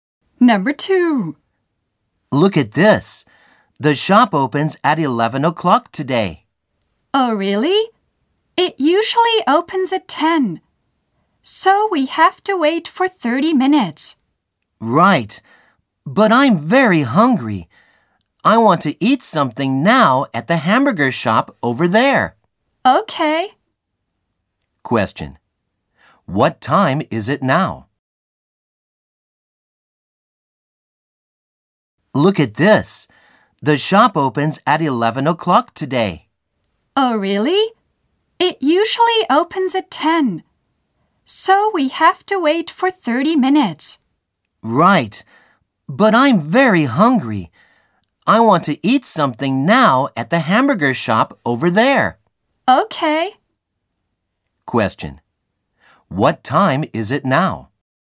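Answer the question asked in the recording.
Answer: 10:30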